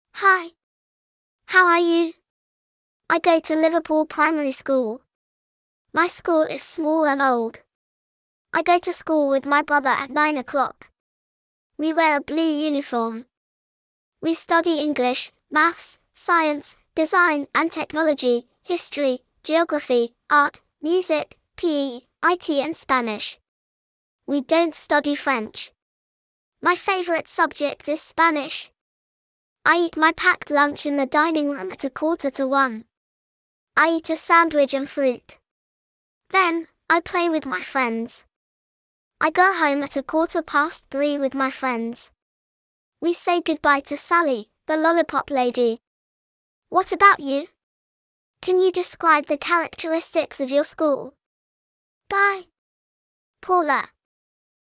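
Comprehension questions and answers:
In pairs, answer the following questions selecting TRUE / FALSE.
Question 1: Paula's school is small and modern.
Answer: FALSE

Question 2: Paula and the other students wear a uniform.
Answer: TRUE

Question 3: Paula's favourite subject is IT.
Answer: FALSE

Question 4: Paula eats her packed lunch at 1:15.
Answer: FALSE

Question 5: Paula goes home at 3:15.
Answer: TRUE

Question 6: Sally is the lollipop lady.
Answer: TRUE

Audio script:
Hi!
How are you? I go to Liverpool Primary School. My school is small and old. I go to school with my brother at nine o'clock. We wear a blue uniform.
We study English, Maths, Science, Design and Technology, History, Geography, Art, Music, PE, IT and Spanish. We don't study French. My favourite subject is Spanish!
I eat my packed lunch in the dining room at a quarter to one. I eat a sandwich and fruit. Then, I play with my friends.
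I go home at a quarter past three with my friends. We say goodbye to Sally, the lollipop lady.
What about you? Can you describe the characteristics of your school?
Bye!
Paula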